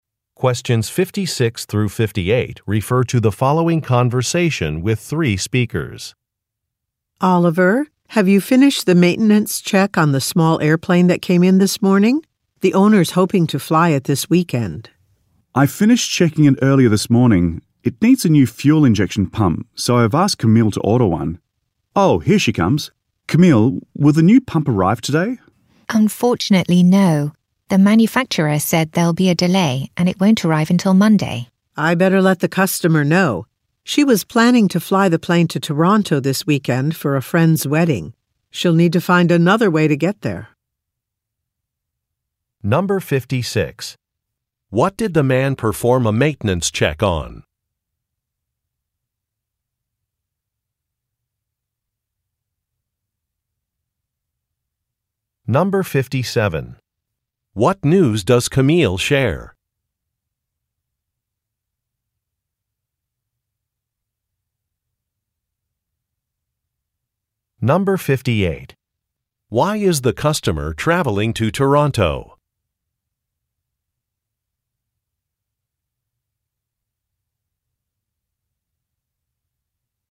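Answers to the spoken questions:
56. A small airplane
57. The new fuel injection pump is delayed until Monday
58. To attend a friend's wedding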